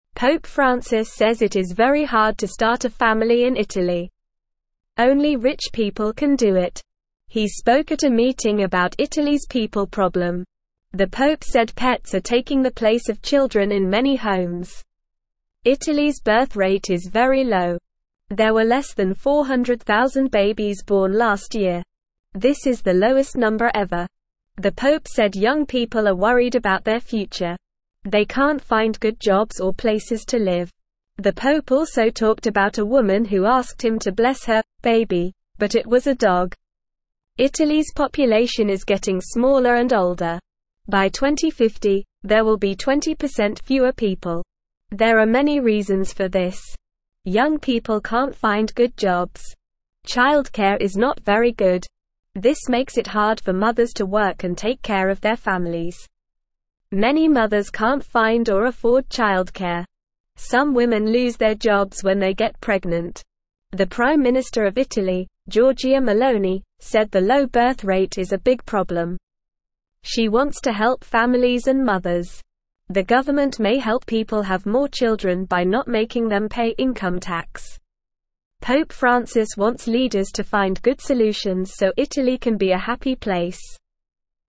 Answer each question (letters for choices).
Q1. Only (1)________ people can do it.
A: rich

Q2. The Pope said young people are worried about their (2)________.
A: future

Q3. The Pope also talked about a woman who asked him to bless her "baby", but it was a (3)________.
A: dog

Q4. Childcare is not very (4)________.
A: good

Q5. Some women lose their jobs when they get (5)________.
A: pregnant

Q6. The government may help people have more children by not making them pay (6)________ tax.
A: income

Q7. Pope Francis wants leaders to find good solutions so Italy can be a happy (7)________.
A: place

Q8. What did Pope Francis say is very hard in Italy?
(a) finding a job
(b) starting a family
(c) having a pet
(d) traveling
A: b

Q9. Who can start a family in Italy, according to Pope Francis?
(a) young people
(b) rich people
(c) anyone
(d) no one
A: b

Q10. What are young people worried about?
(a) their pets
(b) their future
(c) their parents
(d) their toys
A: b

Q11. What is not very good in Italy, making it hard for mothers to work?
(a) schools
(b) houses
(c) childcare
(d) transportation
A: c

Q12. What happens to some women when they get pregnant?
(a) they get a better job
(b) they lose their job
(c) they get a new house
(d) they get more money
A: b

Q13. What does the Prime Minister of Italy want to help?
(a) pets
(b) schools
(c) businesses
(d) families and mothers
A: d

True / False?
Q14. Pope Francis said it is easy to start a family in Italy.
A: False

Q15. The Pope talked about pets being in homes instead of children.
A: True

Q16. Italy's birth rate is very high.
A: False

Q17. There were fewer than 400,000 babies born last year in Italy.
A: True

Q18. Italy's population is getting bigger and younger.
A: False

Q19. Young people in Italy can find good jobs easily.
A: False

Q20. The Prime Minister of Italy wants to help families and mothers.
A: True

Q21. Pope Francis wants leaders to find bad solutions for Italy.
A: False

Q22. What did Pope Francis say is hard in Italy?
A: Starting a family is hard in Italy.

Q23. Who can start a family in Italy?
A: Only rich people can start a family in Italy.

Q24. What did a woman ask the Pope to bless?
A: A woman asked the Pope to bless her "baby", but it was a dog.

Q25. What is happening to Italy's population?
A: Italy's population is getting smaller and older.

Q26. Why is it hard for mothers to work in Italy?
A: It is hard for mothers to work in Italy because childcare is not very good and some women lose their jobs when they get pregnant.

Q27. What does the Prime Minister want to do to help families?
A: The Prime Minister wants to help families and mothers by possibly not making them pay income tax.

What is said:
Pope Francis says it is very hard to start a family in Italy. Only rich people can do it. He spoke at a meeting about Italy's people problem. The Pope said pets are taking the place of children in many homes.
Italy's birth rate is very low. There were less than 400,000 babies born last year. This is the lowest number ever. The Pope said young people are worried about their future. They can't find good jobs or places to live. The Pope also talked about a woman who asked him to bless her "baby", but it was a dog.
Italy's population is getting smaller and older. By 2050, there will be 20% fewer people. There are many reasons for this. Childcare is not very good. This makes it hard for mothers to work and take care of their families. Many mothers can't find or afford childcare. Some women lose their jobs when they get pregnant.
The Prime Minister of Italy, Giorgia Meloni, said the low birth rate is a big problem. She wants to help families and mothers. The government may help people have more children by not making them pay income tax. Pope Francis wants leaders to find good solutions so Italy can be a happy place.

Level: Level 1